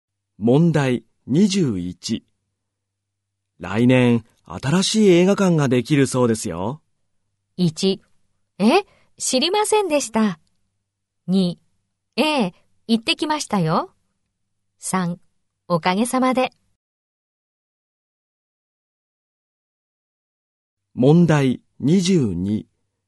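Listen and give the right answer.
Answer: 1: え、知りませんでした。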